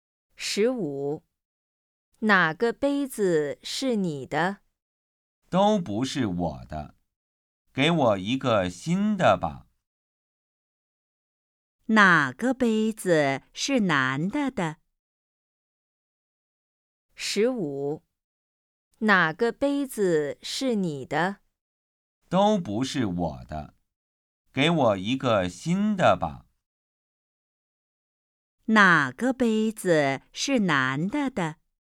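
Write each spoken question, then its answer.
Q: 哪个杯子是男的的?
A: 都不是他的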